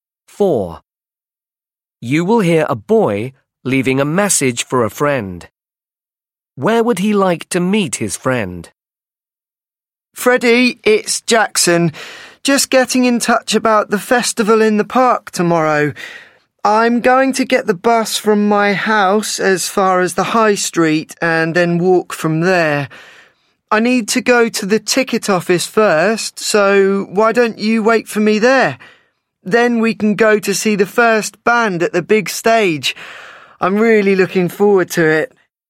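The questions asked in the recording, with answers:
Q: Where would he like to meet his friend?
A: at the ticket office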